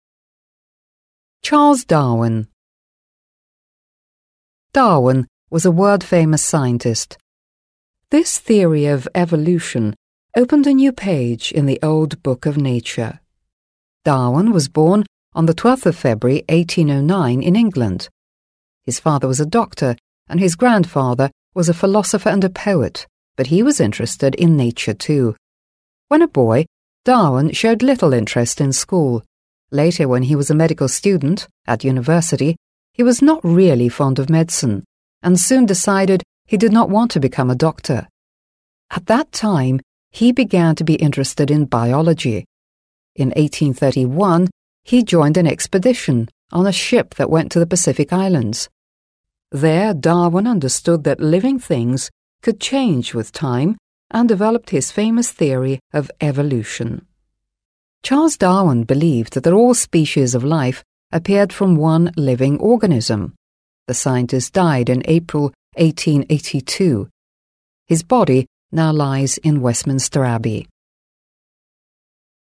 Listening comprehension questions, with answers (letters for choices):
C. Choose the appropriate variants to complete the sentences.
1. Charles Darwin was born ... .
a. in the seventeenth century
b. in the eighteenth century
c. in the nineteenth century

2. Charles Darwin was born in ... .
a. Great Britain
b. the USA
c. Australia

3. Some of Darwin's relatives were interested in ... .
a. painting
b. living things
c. writing stories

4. At the beginning of the 19th century he ... .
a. made a voyage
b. had a train journey around South America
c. lived for some time on the Pacific Islands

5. Charles Darwin's body lies ... .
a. in one of the English cathedrals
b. on some Pacific island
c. on the Pacific coast of South America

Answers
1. c
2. a
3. b
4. a
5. a

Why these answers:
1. Здесь правильный вариант c. В тексте указан 1809 год. По правилам исчисления времени, годы, начинающиеся на «18..», относятся к 19-му веку (nineteenth century).
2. Правильный вариант a. В тексте сказано, что он родился в Англии (in England). Англия является частью Великобритании (Great Britain), поэтому этот вариант верный. США и Австралия не подходят.
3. Правильный вариант b. В тексте упоминается, что его дедушка интересовался природой (was interested in nature). Выражение living things (живые существа/живая природа) здесь выступает синонимом слова nature.
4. Правильный вариант a. В тексте сказано: In 1831 he joined an expedition on a ship (В 1831 году он присоединился к экспедиции на корабле). Слово voyage ['vɔɪɪdʒ] [войидз] означает длительное морское путешествие. 1831 год — это первая половина (начало) 19-го века.
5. Правильный вариант a. В тексте говорится: lies in Westminster Abbey (лежит в Вестминстерском аббатстве). Вестминстерское аббатство — это знаменитая готическая церковь (собор) в Лондоне, где похоронены многие великие люди.

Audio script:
Charles Darwin
Charles Darwin was a world-famous scientist. His theory ['θɪəri] of evolution [ˌevə'luːʃn] opened a new page in the old book of nature1. Darwin was born on 12th February 1809 in England. His father was a doctor and his grandfather was a philosopher [fɪ'lɒsəfə] and a poet, but he was interested in nature too.
When a boy, Darwin showed little interest in school. Later, when he was a medical student at university, he was not really fond of medicine ['medsən] and soon decided he did not want to become a doctor. At that time, he began to be interested in biology.
In 1831 he joined an expedition [ˌekspɪ'dɪʃn] on a ship that went to the Pacific Islands. There Darwin understood that living things could change with time and developed his famous theory of evolution. Charles Darwin believed that all species of life appeared from one living organism.
The scientist died in April 1882. His body now lies in Westminster Abbey.

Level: 7 класс